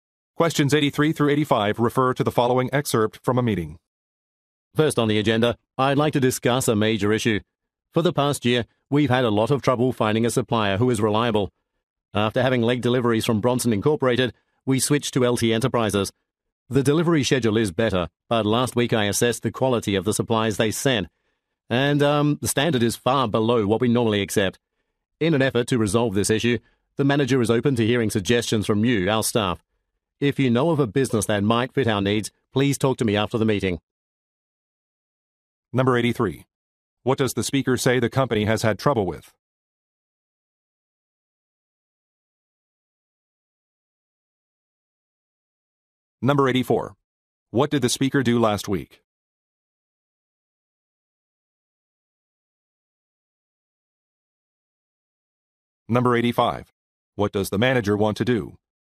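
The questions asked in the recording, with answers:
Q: What does the speaker say the company has had trouble with?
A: Finding a reliable supplier

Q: What did the speaker do last week?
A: Assessed the quality of supplies

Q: What does the manager want to do?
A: Hear suggestions from staff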